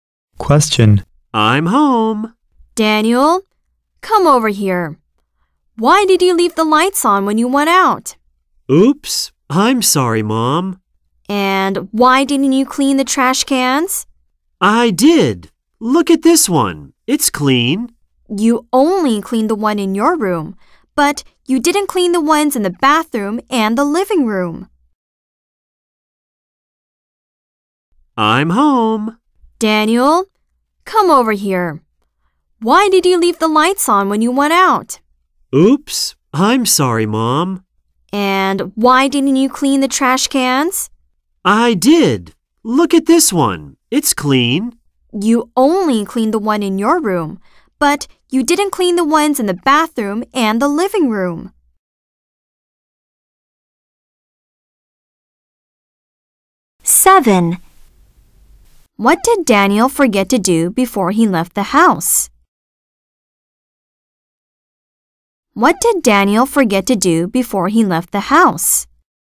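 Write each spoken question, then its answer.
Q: What did Daniel forget to do before he left the house?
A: Turn off the lights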